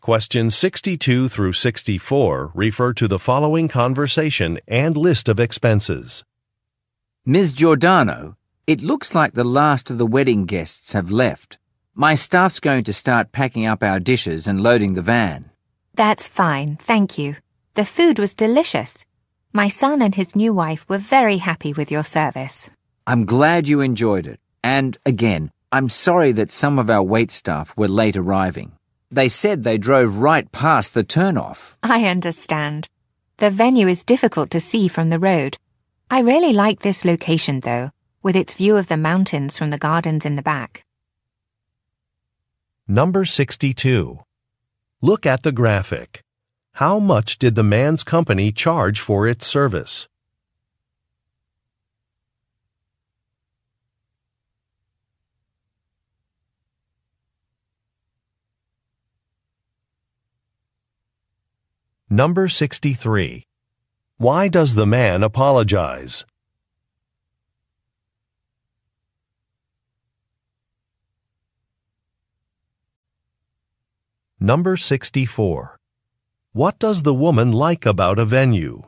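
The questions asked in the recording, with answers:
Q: Why does the man apologize?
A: Some of his wait staff arrived late.

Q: What does the woman like about a venue?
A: Its view of the mountains from the gardens.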